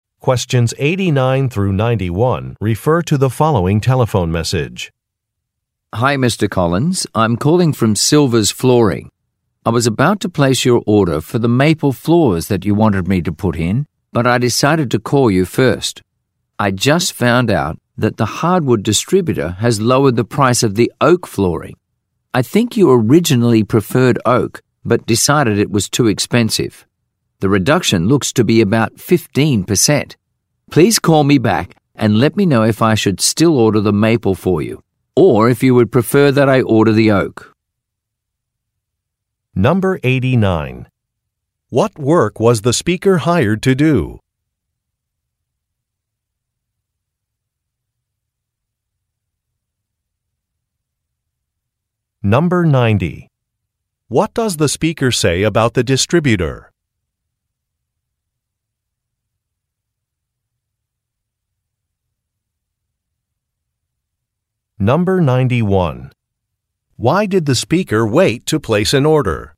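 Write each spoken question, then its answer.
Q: What work was the speaker hired to do?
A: Install floors

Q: What does the speaker say about the distributor?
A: It lowered the price of oak flooring

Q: Why did the speaker wait to place an order?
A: To tell the customer about the lower price of oak, in case he prefers oak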